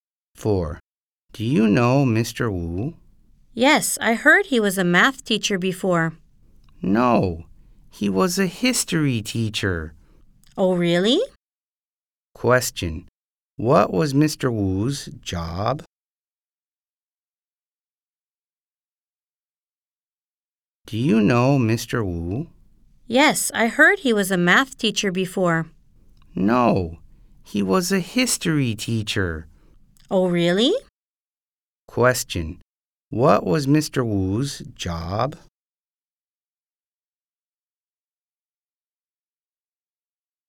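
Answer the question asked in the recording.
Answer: A history teacher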